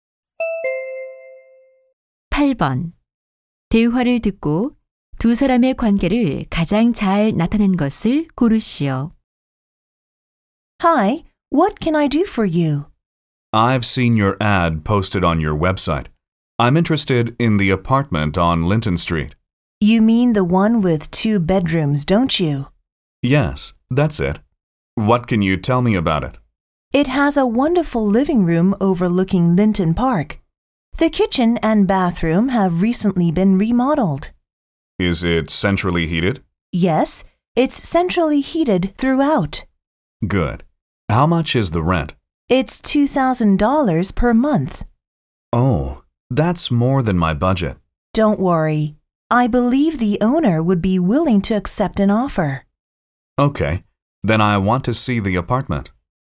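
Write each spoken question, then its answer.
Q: 대화를 듣고 두 사람의 관계를 가장 잘 나타낸 것을 고르시오.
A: 부동산 중개인 - 고객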